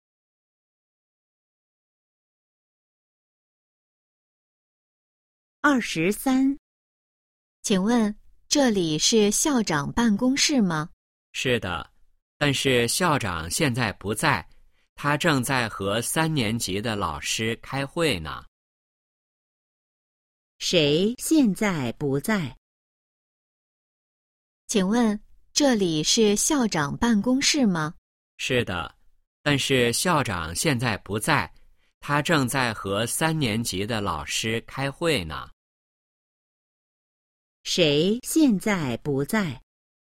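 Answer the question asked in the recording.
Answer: 校长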